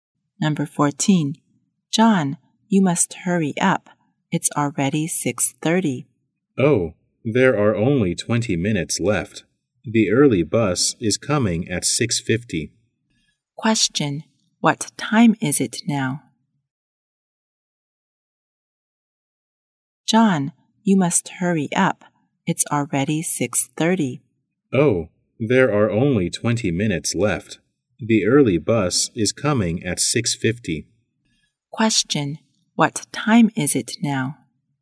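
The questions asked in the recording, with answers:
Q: Question. What time is it now?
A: 6:30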